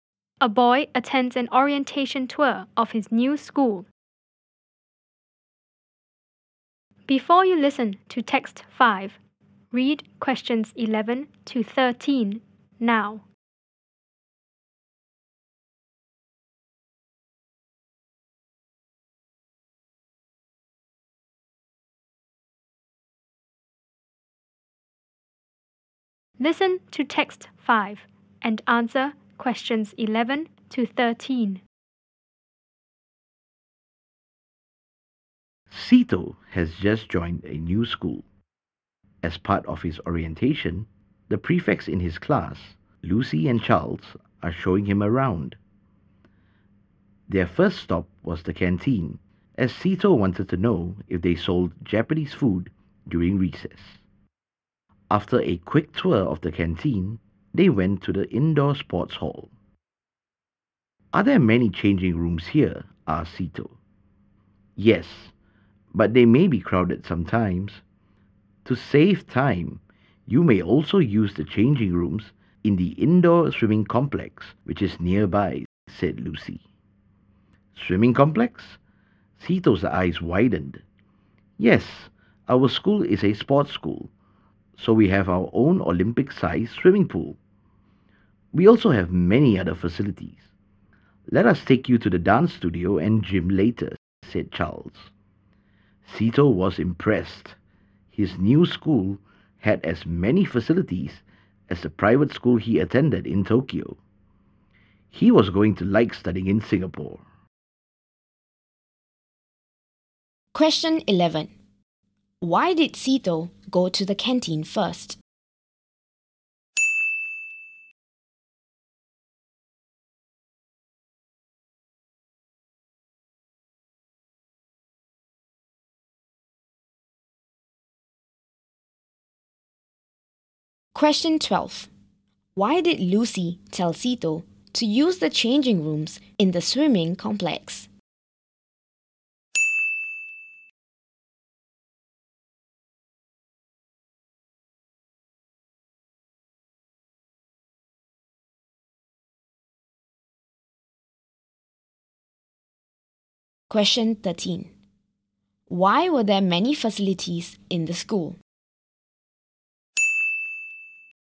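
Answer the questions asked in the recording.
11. He wanted to know if they sold Japanese food during recess.
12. To save time, as the sports hall changing rooms may be crowded.
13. Because it is a sports school.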